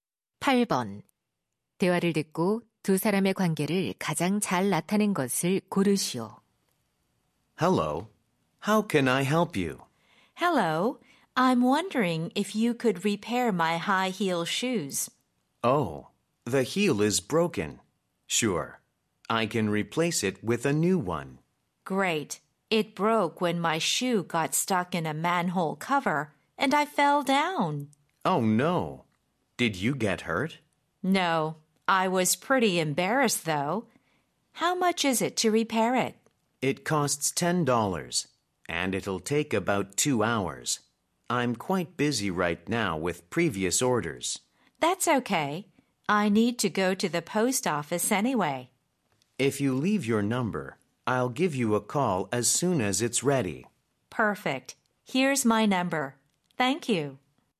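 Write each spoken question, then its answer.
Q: 대화를 듣고 두 사람의 관계를 가장 잘 나타낸 것을 고르시오.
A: 손님 - 구두 수선공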